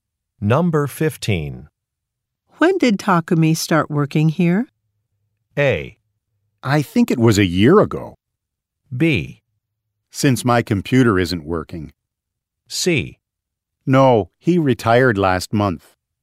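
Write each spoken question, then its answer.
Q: When did Takumi start working here?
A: A: I think it was a year ago.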